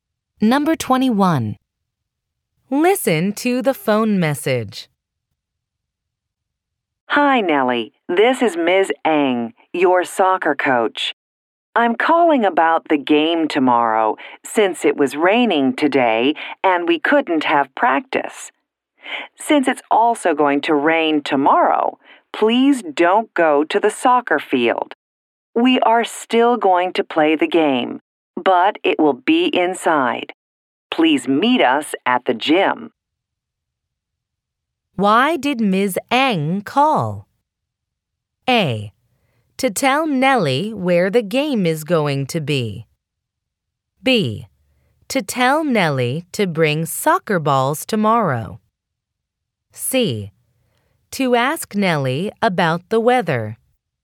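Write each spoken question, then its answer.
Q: Why did Ms. Eng call?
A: A: To tell Nellie where the game is going to be.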